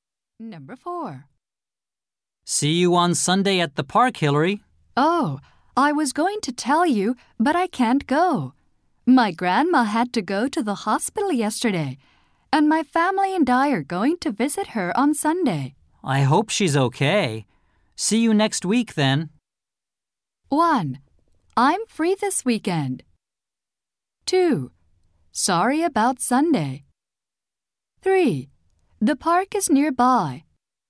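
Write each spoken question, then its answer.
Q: I hope she's okay. See you next week, then.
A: 2: Sorry about Sunday.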